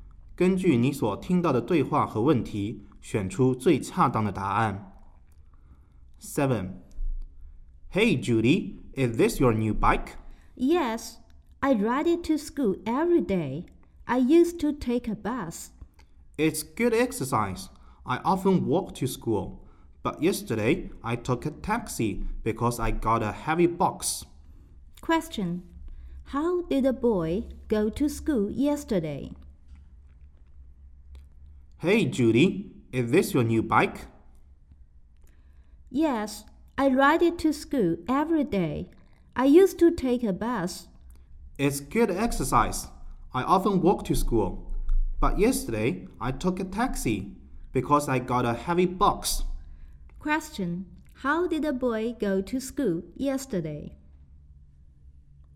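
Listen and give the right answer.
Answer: By taxi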